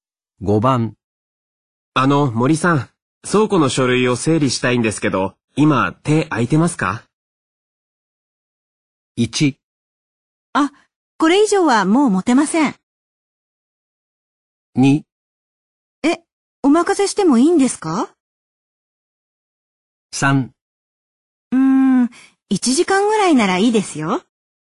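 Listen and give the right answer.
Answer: 3: 1時間ぐらいならいいですよ。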